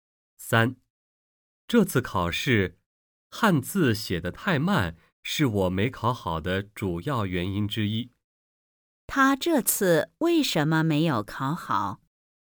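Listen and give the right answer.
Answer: 汉字写得太慢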